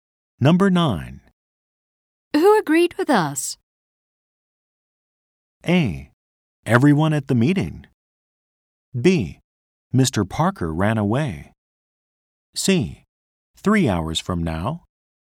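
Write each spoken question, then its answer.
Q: Who agreed with us?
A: A: Everyone at the meeting.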